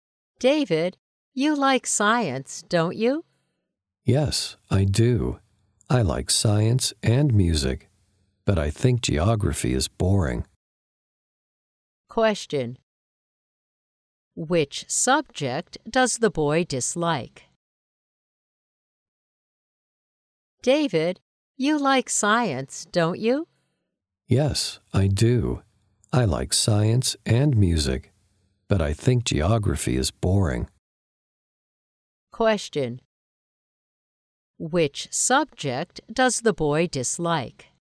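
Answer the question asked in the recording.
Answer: Geography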